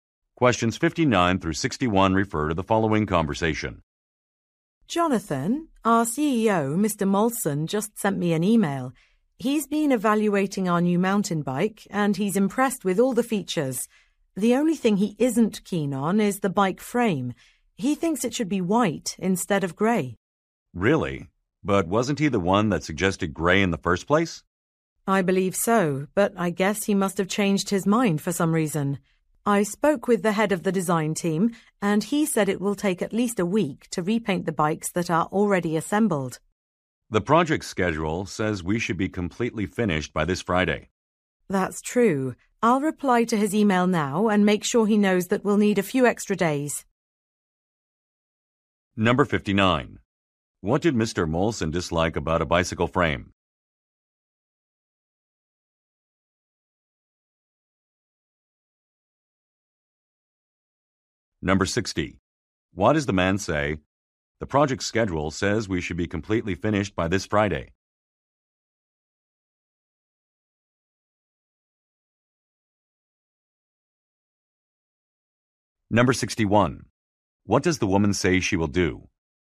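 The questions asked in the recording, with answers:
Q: What did Mr. Molson dislike about a bicycle frame?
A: Its grey color

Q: What does the woman say she will do?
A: Reply to Mr. Molson's email saying they need extra days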